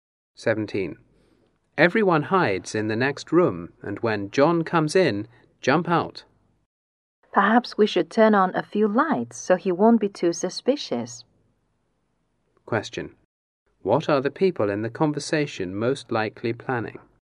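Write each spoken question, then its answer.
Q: What are the people in the conversation most likely planning?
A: A surprise party for John.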